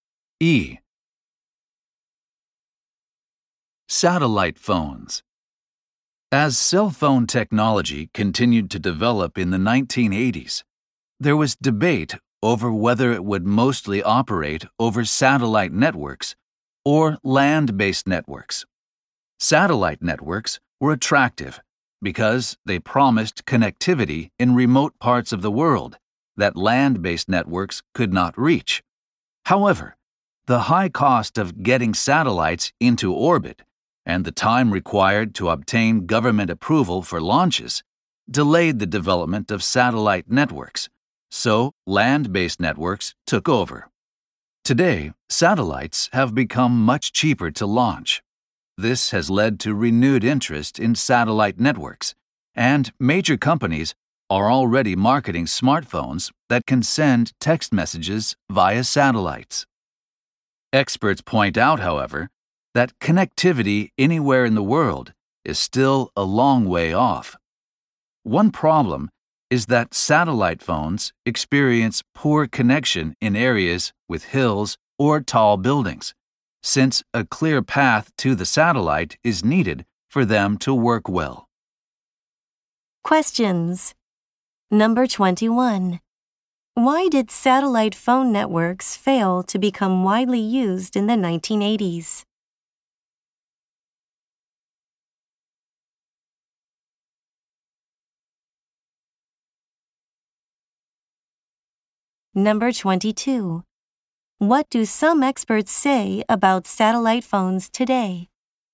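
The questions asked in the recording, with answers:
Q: Why did satellite phone networks fail to become widely used in the 1980s?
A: Launching satellites was expensive and getting government approval took time

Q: What do some experts say about satellite phones today?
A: Worldwide connectivity is still a long way off; they connect poorly near hills or tall buildings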